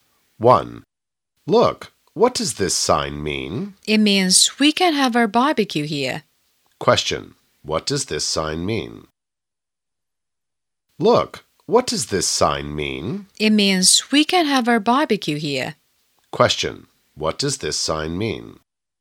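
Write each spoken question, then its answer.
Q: Question, what does this sign mean?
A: We can have our barbecue here.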